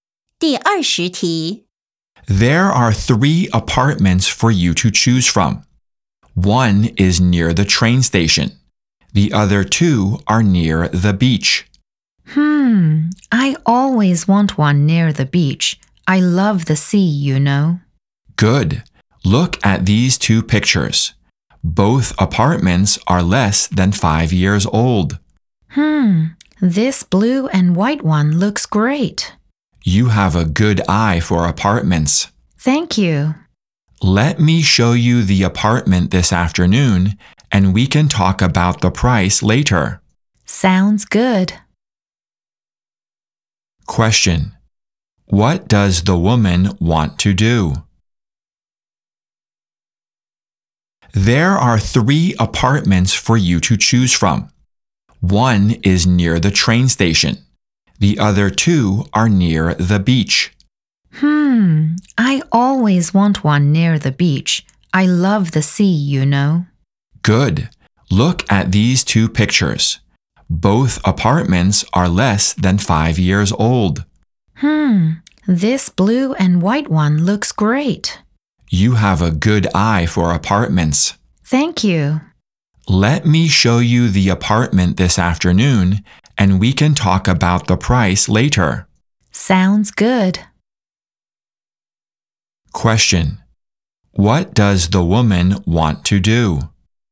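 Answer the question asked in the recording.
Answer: See the apartment near the beach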